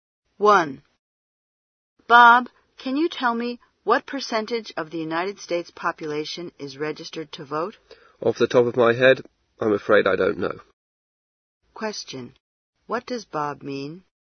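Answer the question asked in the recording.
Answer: He doesn't know the percentage offhand.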